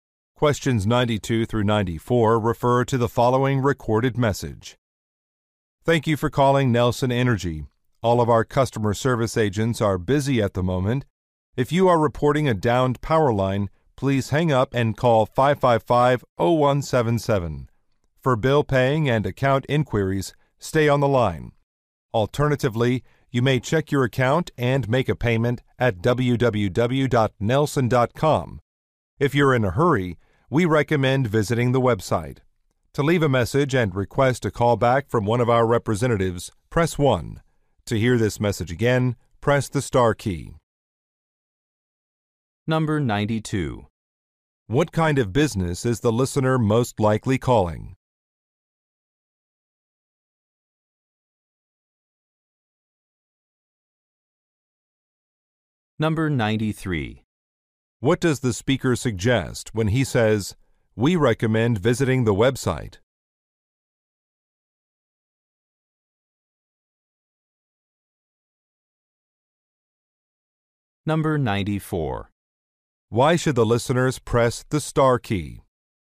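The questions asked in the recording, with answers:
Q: What kind of business is the listener most likely calling?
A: An energy (utility) company

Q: Why should the listeners press the star key?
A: To hear the message again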